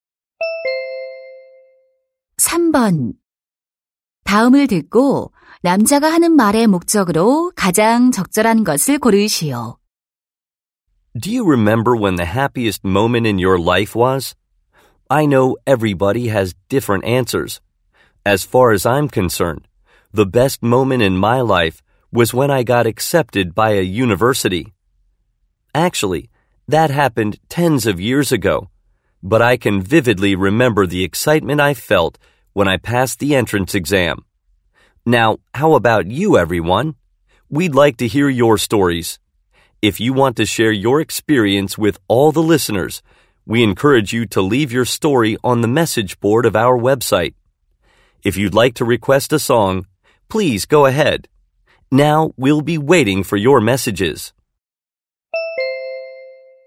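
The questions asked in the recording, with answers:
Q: 다음을 듣고 남자가 하는 말의 목적으로 가장 적절한 것을 고르시오.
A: 청취자들에게 인생에서 가장 행복했던 순간의 이야기를 웹사이트 게시판에 남겨 달라고 요청하려고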